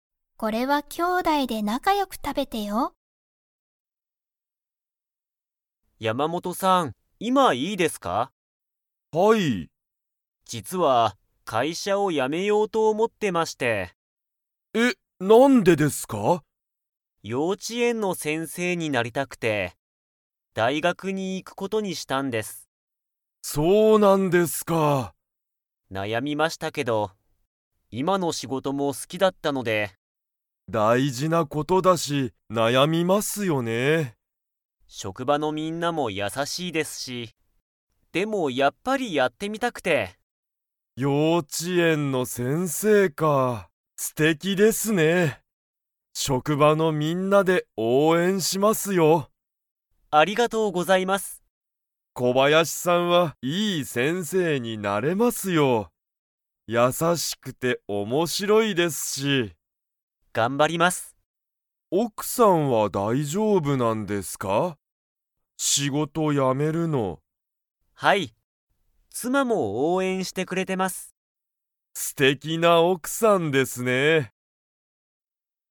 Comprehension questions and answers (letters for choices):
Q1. 小林こばやしさんは、仕事しごとを辞やめようと 。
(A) 思おもってる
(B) 思おもってない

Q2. 小林こばやしさんは何なにになりたいですか?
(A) 職場しょくばのみんな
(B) 幼稚ようち園えんの先生せんせい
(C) 小学校しょうがっこうの先生せんせい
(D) 素敵すてきな奥おくさん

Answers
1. A
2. B

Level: Level 4